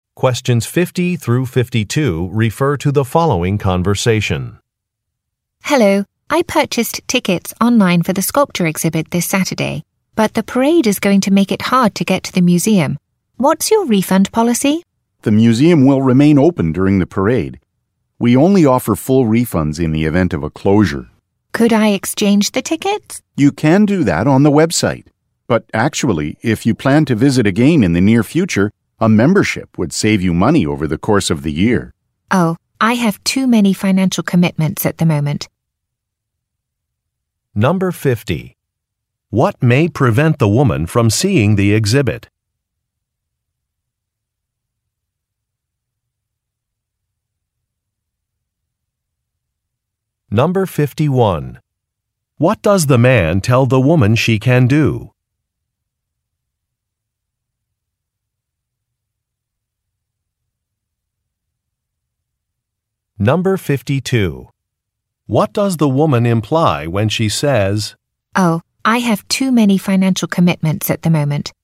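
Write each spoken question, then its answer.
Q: What may prevent the woman from seeing the exhibit?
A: A parade

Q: What does the man tell the woman she can do?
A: Exchange the tickets on the website

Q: What does the woman imply when she says,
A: She is not interested in buying a membership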